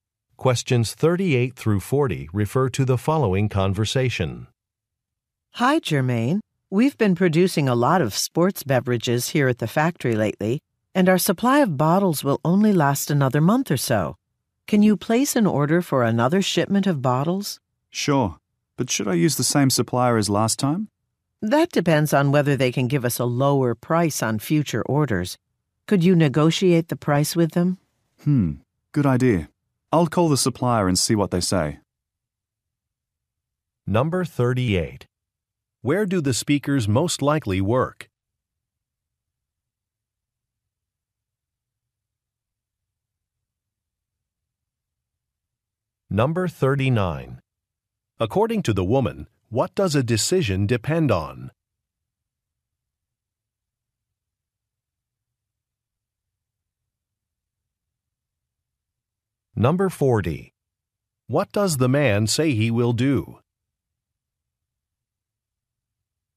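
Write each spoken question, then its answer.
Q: Where do the speakers most likely work?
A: At a beverage factory

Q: According to the woman, what does a decision depend on?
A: Whether the supplier can give a lower price

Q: What does the man say he will do?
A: Call the supplier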